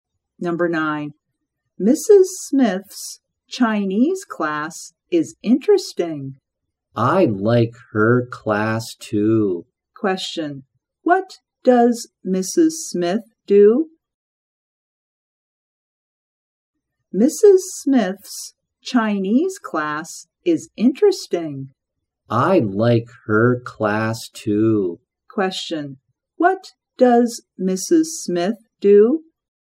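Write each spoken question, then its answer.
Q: What does Mrs. Smith do?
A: She is a Chinese teacher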